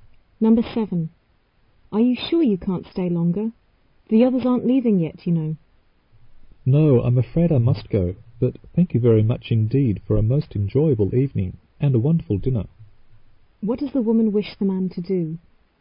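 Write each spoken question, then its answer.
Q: What does the woman wish the man to do?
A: Stay longer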